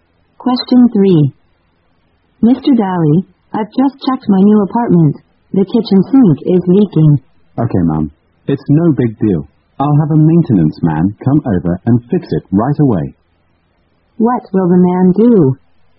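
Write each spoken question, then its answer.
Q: What will the man do?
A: Send a maintenance man to fix the leaking sink right away.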